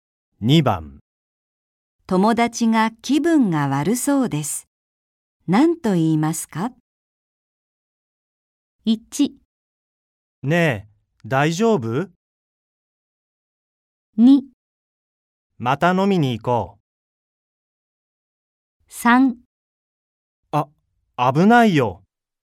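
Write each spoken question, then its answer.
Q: 友達が気分が悪そうです。何と言いますか?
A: 1: ねえ、大丈夫?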